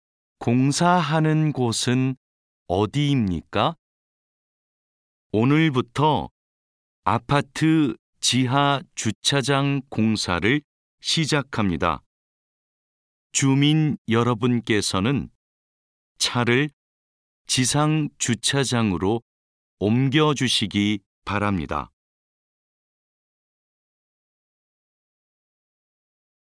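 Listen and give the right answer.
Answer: 아파트 지하 주차장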